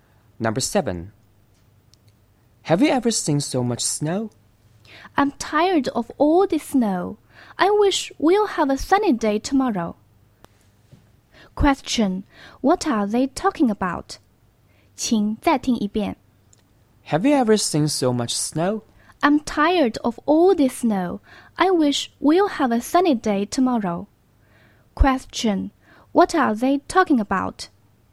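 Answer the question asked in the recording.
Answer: The weather (the snow)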